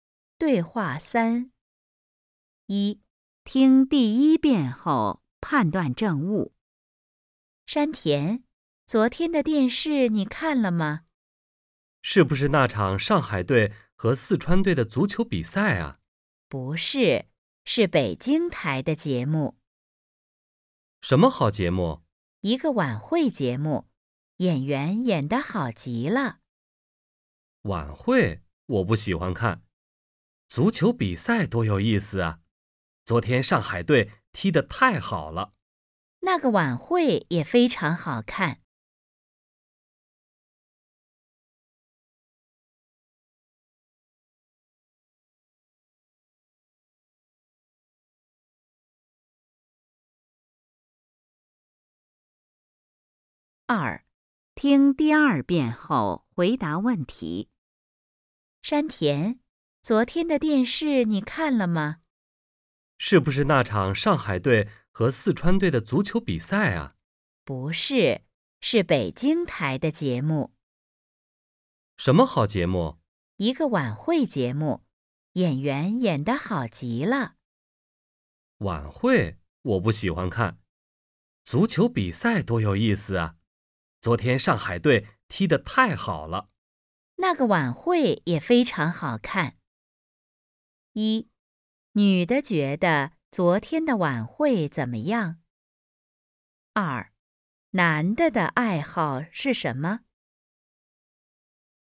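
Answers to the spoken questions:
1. 非常好看,演员演得好极了
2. 看足球比赛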